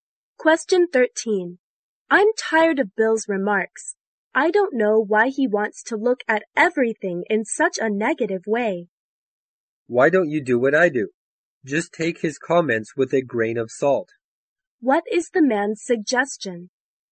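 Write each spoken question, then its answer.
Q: What is the man's suggestion?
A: Don't take Bill's remarks too seriously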